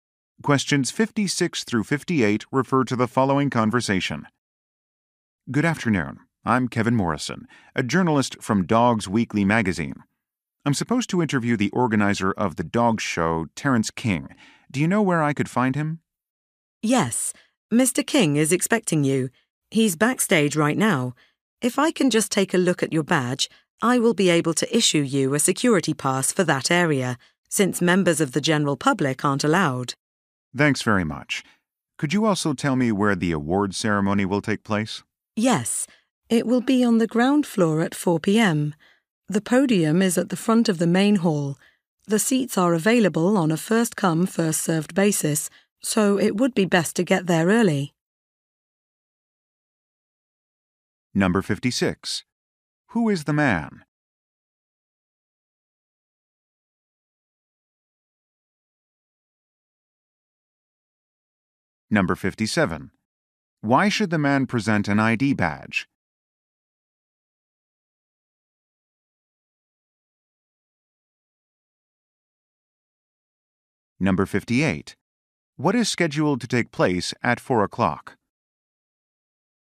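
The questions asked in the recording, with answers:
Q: Who is the man?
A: A journalist

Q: Why should the man present an ID badge?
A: To get a security pass for backstage

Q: What is scheduled to take place at 4 o'clock?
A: An award ceremony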